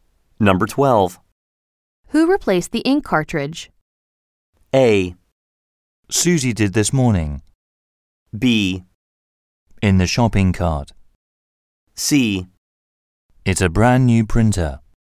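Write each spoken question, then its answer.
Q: Who replaced the ink cartridge?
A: A: Susie did this morning.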